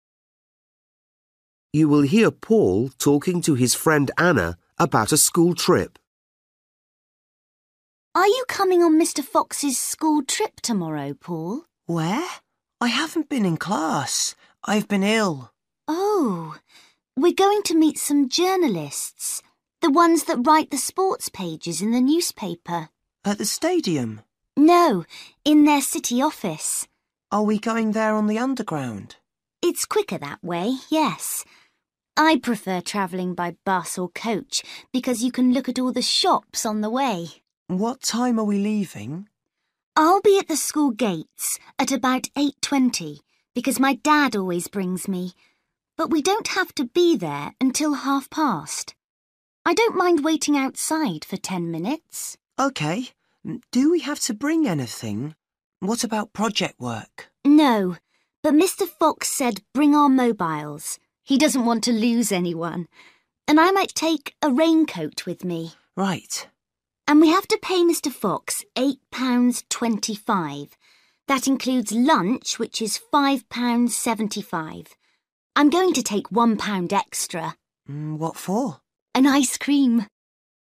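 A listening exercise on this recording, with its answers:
For each question, choose the correct answer.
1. The group of students are going to visit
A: a newspaper office (sports journalists)

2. How does Anna feel about going on the underground?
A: She prefers the bus or coach so she can see the shops

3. The students must meet at school at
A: 8:30

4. The students need to take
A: their mobile phones

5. The total price for the trip is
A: £8.25

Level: Luyện nghe trình độ A2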